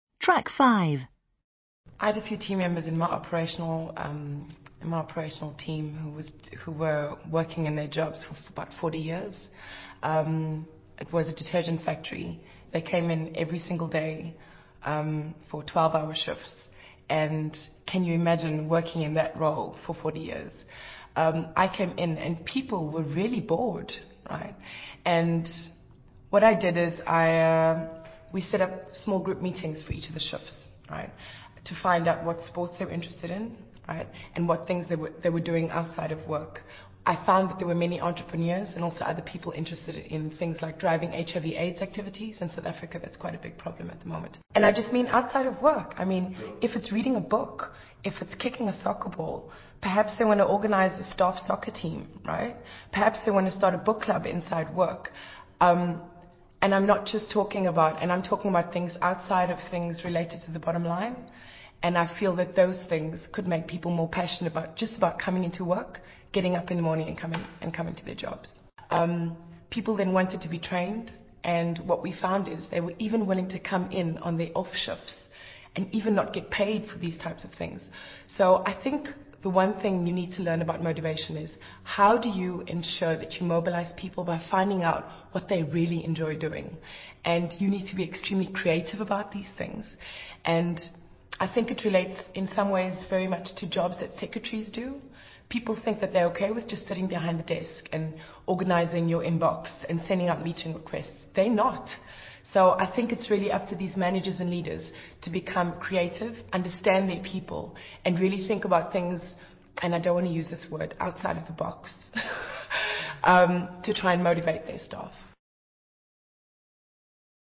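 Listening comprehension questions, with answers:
Listen to Janine George, another MBA student at Camgridge, talking about motivation, and answer these questions.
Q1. How long had some of Janine's operational team been working in their jobs?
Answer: About 40 years.

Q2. What kind of company is Janine talking about?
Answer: A detergent factory.

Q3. How long are the working days?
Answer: 12-hour shifts.

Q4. How did she find the workers when she arrived at the company?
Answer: Really bored.

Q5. What did she do to rectify the situation?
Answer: She set up small group meetings for each shift to find out their interests outside work.

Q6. What did she find out at the meetings?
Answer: Many were entrepreneurs or interested in things like HIV/AIDS activities.

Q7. What examples does she give of out-of-work activities that the company was able to draw on to motivate staff?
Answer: A staff soccer team, a book club, HIV/AIDS activities.

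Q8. What was the lesson of this experience for Janine?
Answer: You mobilize people by finding out what they really enjoy doing, and you must be creative.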